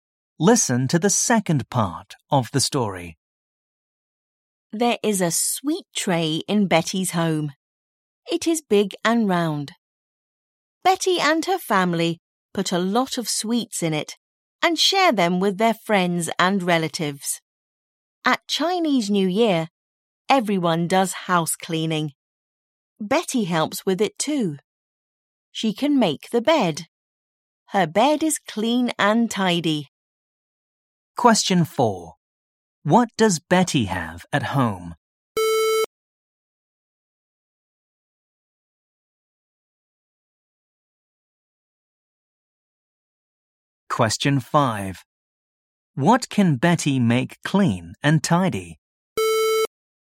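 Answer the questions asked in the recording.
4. A sweet tray
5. Her bed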